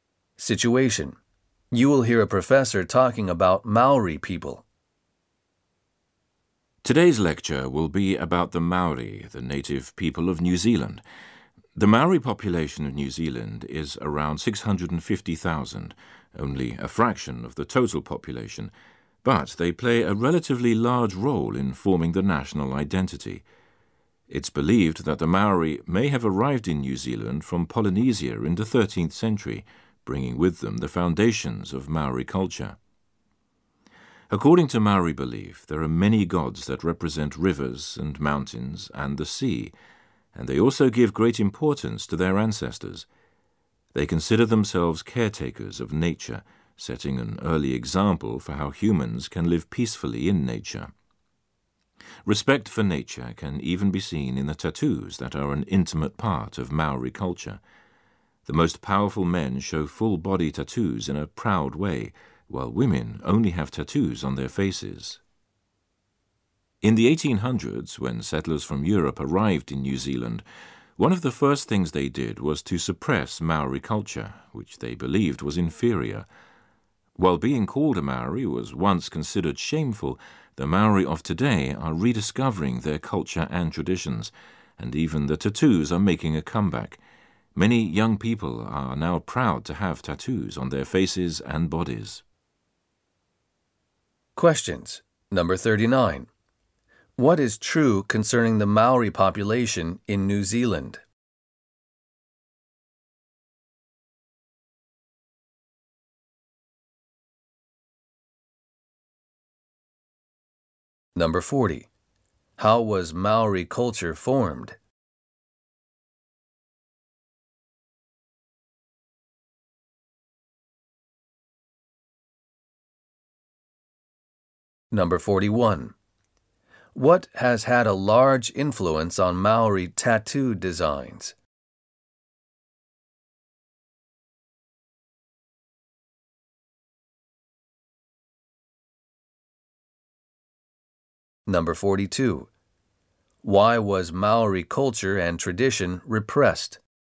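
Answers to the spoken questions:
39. It is a small fraction of the total population but plays a relatively large role in the national identity.
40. Its foundations were brought from Polynesia when the Maori arrived in the 13th century.
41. Respect for nature
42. European settlers believed it was inferior.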